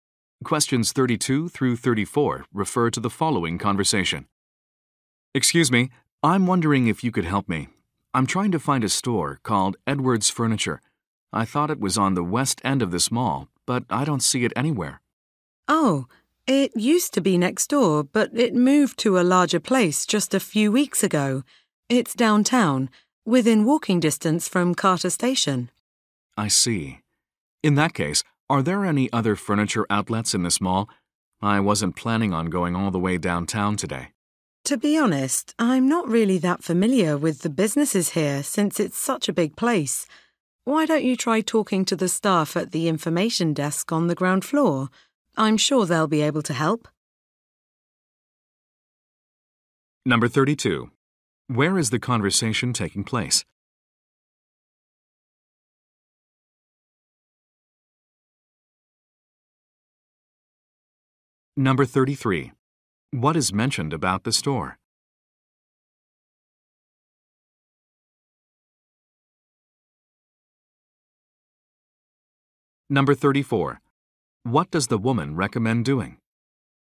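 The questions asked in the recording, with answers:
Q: Where is the conversation taking place?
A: In a shopping mall

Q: What is mentioned about the store?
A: It moved to a larger place downtown

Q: What does the woman recommend doing?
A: Asking the staff at the information desk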